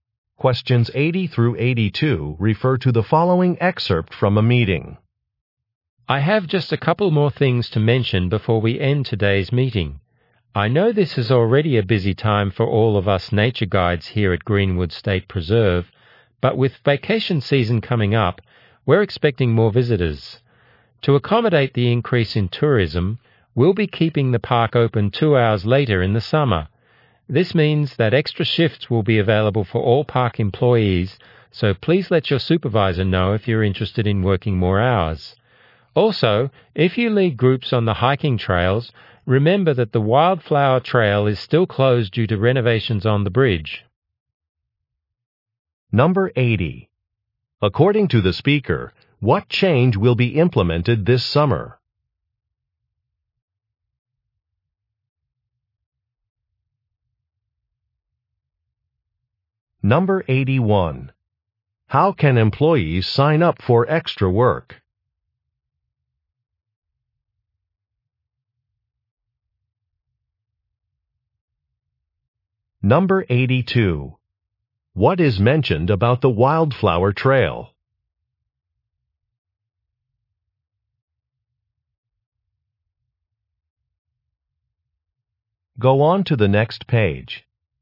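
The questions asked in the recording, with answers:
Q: According to the speaker, what change will be implemented this summer?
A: The park will stay open 2 hours later

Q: How can employees sign up for extra work?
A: By telling their supervisor

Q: What is mentioned about the Wildflower Trail?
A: It is closed for bridge renovations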